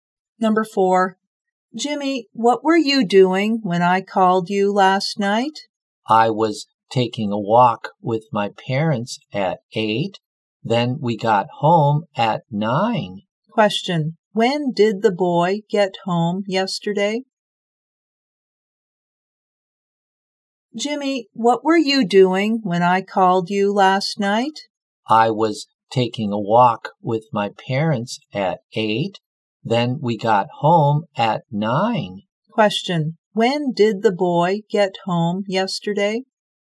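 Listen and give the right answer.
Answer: At 9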